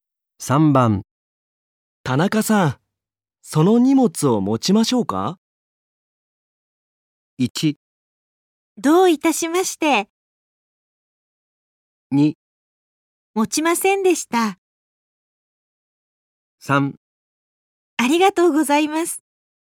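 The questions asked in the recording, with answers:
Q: 田中さん、その荷物を持ちましょうか?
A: 3: ありがとうございます。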